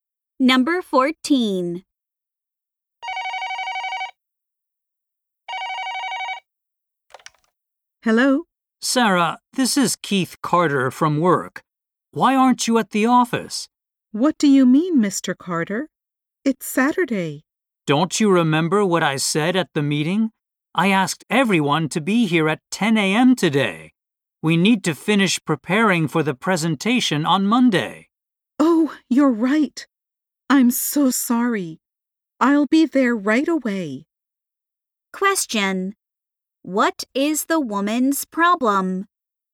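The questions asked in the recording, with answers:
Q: What is the woman's problem?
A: She forgot she had to come to work on Saturday.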